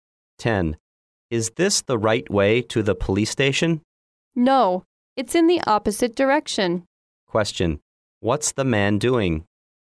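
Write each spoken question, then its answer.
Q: What's the man doing?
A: Asking the way to the police station.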